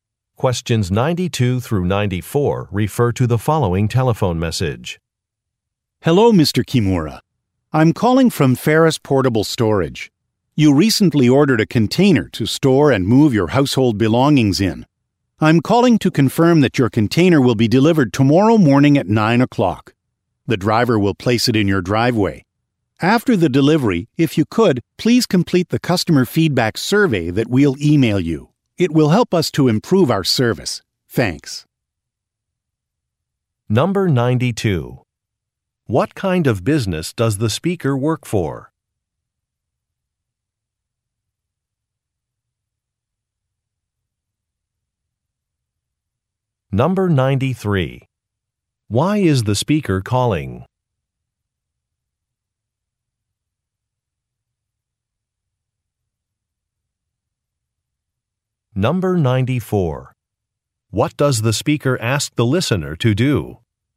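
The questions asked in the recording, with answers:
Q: What kind of business does the speaker work for?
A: A portable storage company.

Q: Why is the speaker calling?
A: To confirm a delivery time.

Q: What does the speaker ask the listener to do?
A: Complete a customer feedback survey.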